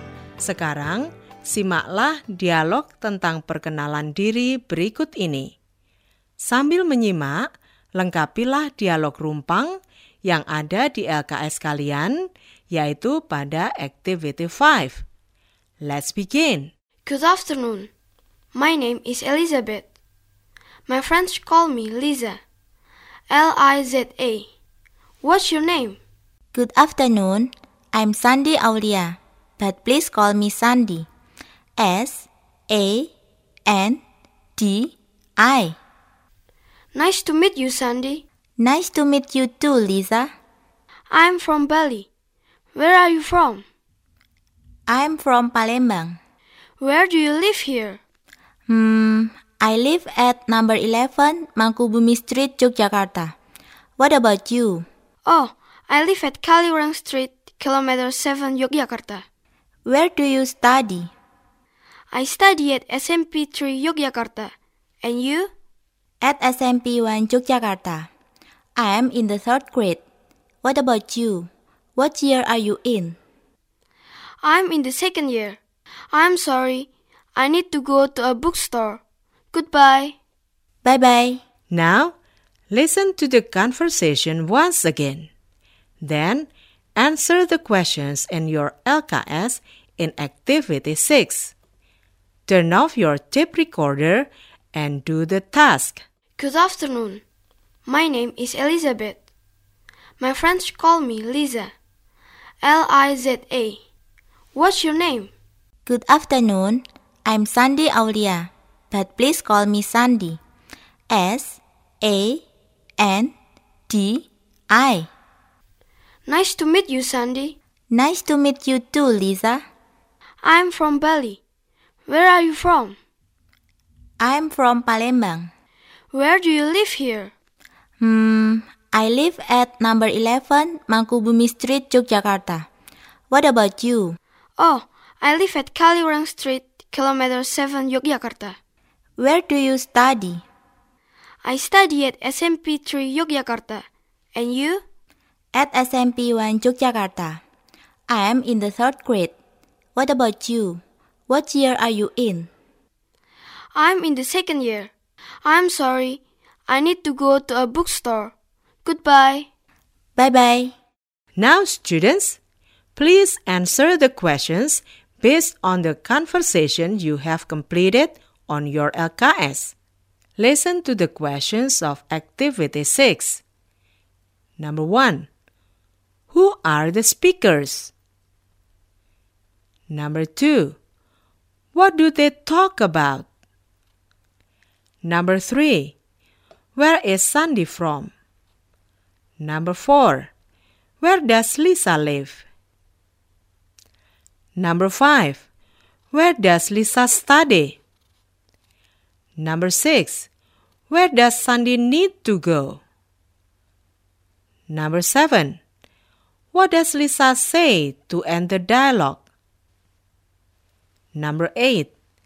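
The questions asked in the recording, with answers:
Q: Who are the speakers?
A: Liza and Sandy

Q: What do they talk about?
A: Introducing themselves

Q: Where does Sandy need to go?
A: To a bookstore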